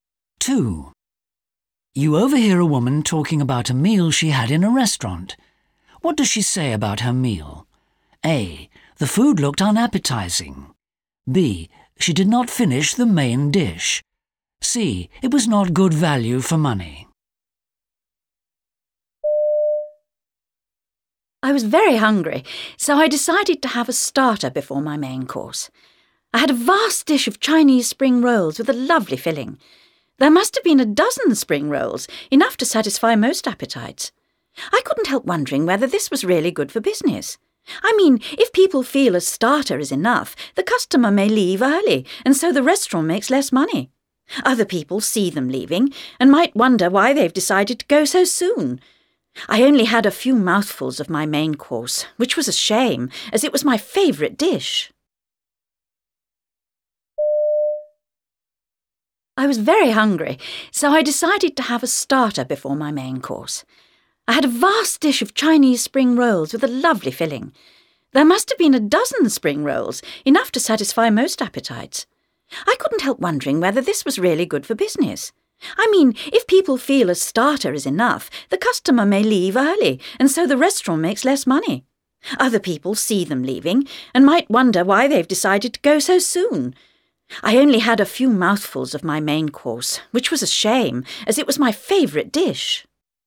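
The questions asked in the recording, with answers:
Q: What does she say about her meal?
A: B: She did not finish the main dish.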